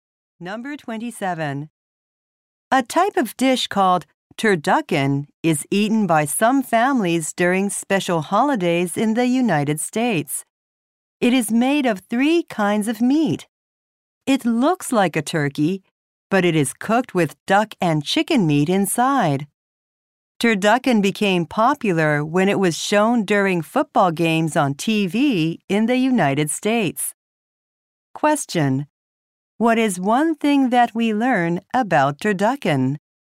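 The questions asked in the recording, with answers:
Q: What is one thing that we learn about turducken?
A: It is made of three kinds of meat.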